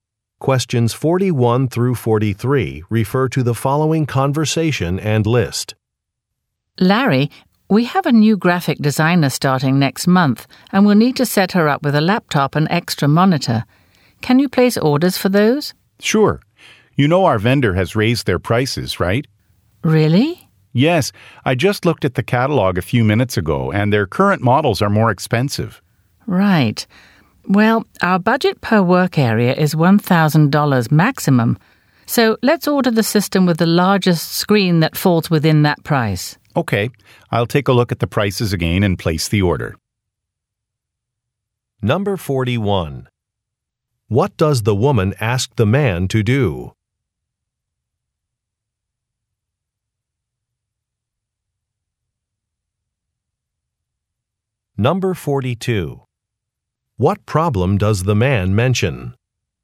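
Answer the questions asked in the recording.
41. Order a laptop and an extra monitor
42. The vendor has raised its prices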